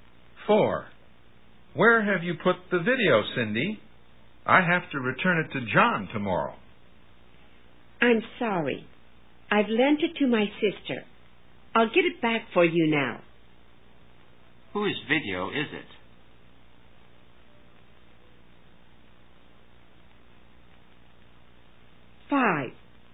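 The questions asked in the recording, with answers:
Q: Whose video is it?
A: John's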